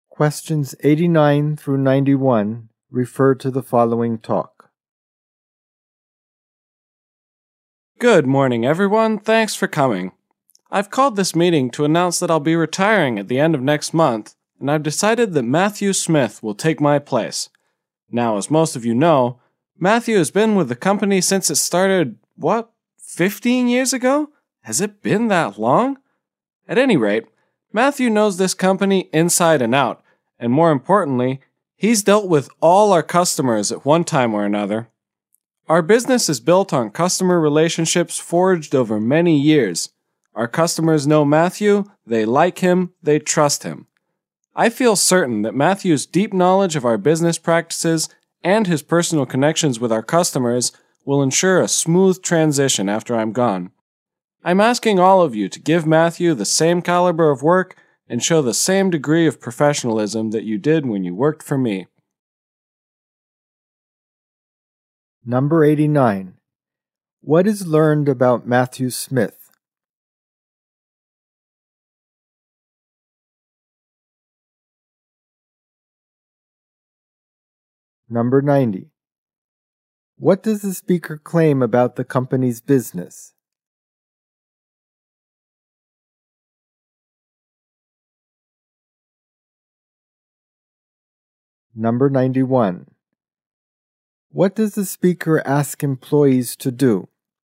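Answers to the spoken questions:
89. He has been with the company since it started, 15 years ago, and will replace the speaker
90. It is built on long-term customer relationships
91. Give Matthew the same quality of work and professionalism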